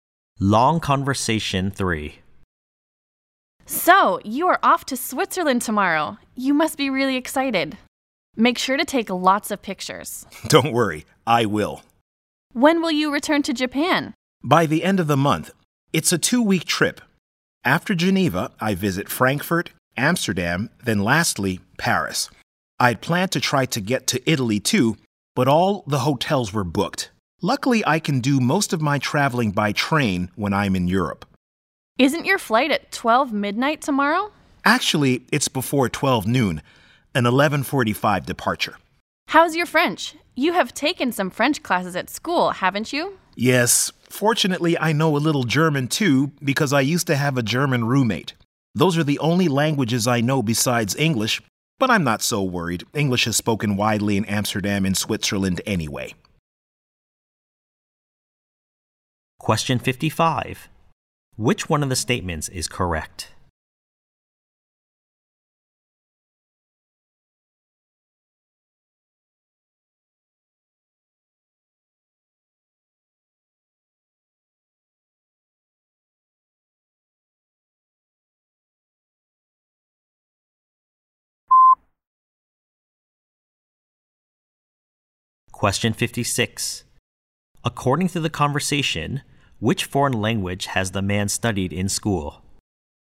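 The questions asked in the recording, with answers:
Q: According to the conversation, which foreign language has the man studied in school?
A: French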